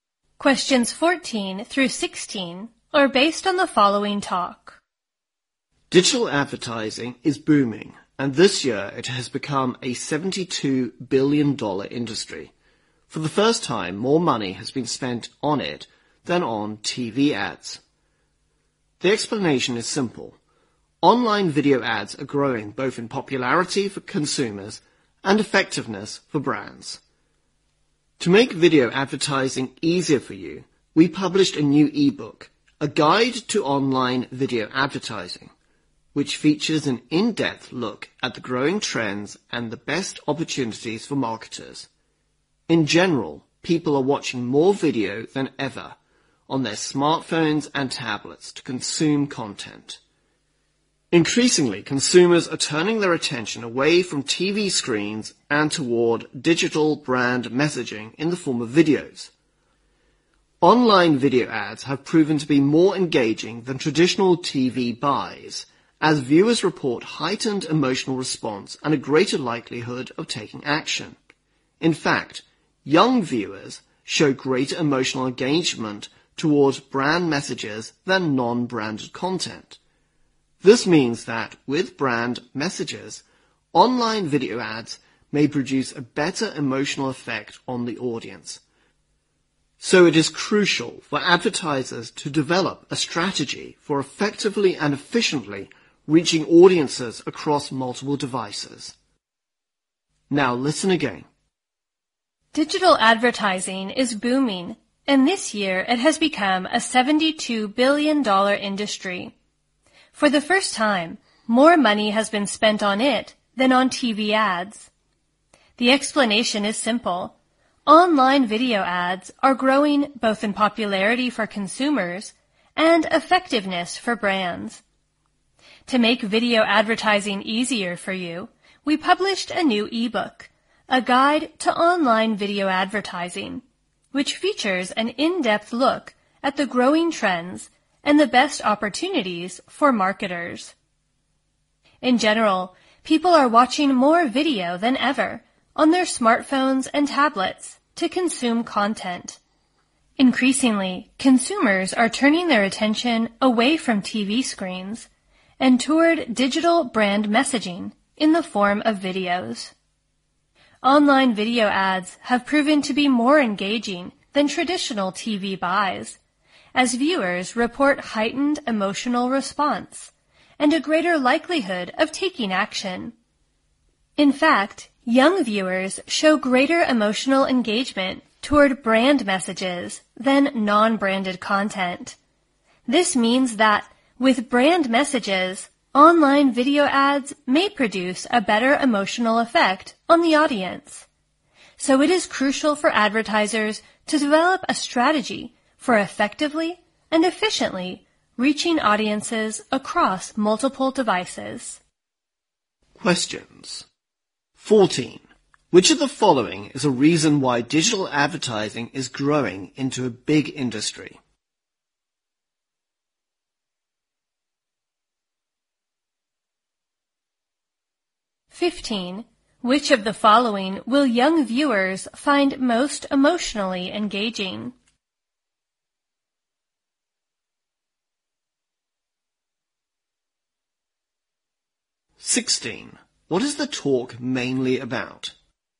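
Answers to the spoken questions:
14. Online video ads are becoming more popular with consumers and more effective for brands
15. Online video ads with brand messages
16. Online video advertising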